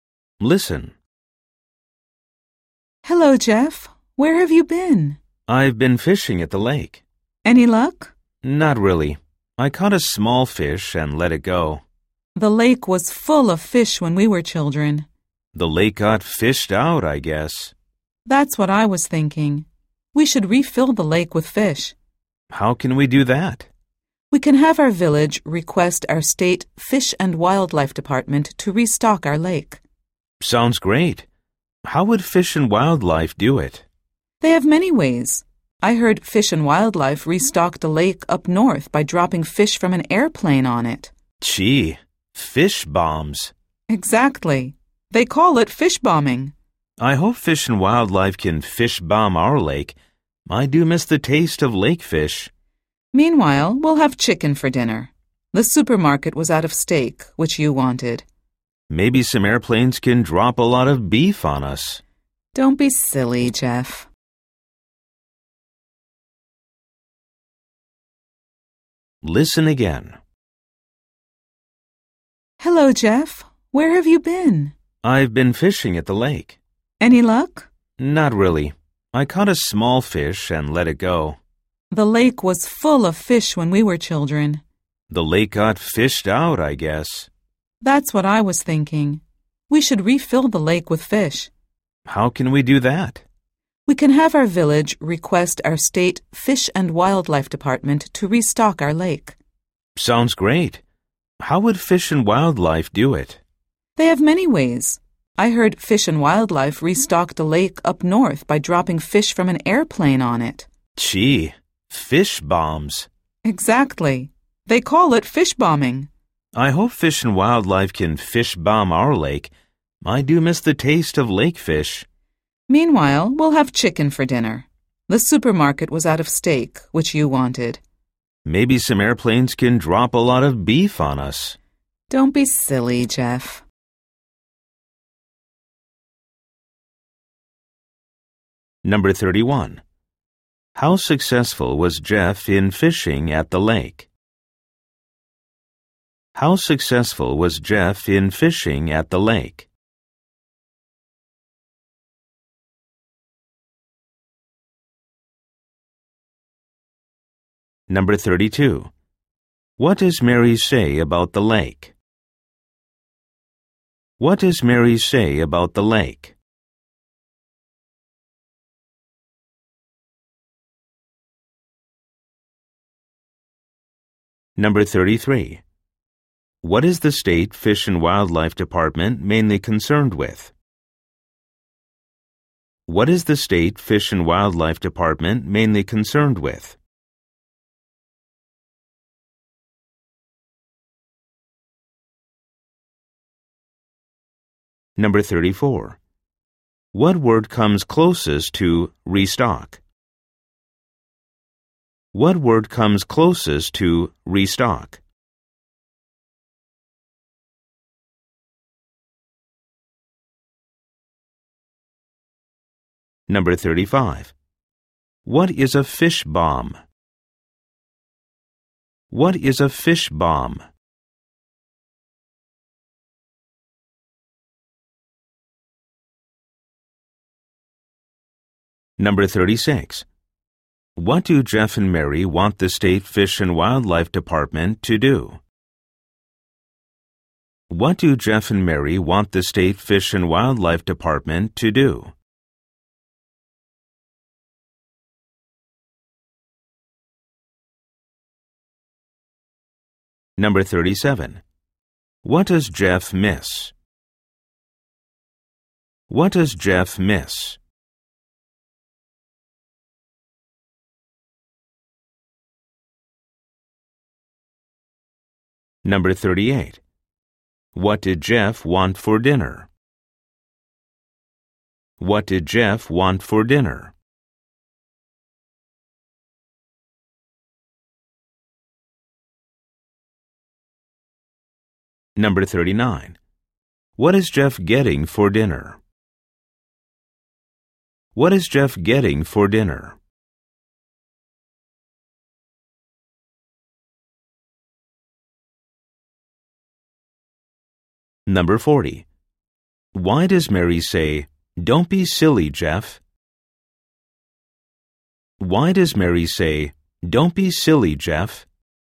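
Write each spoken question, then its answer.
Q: How successful was Jeff in fishing at the lake?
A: Not very; he caught one small fish and let it go

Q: What does Mary say about the lake?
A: It was full of fish when they were children

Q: What word comes closest to restock?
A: Refill

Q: What is a fish bomb?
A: Fish dropped from an airplane into a lake

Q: What do Jeff and Mary want the State Fish and Wildlife Department to do?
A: Restock their lake with fish

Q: What does Jeff miss?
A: The taste of lake fish

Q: What did Jeff want for dinner?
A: Steak

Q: What is Jeff getting for dinner?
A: Chicken

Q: Why does Mary say, "Don't be silly, Jeff"?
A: Because Jeff joked that airplanes could drop beef on them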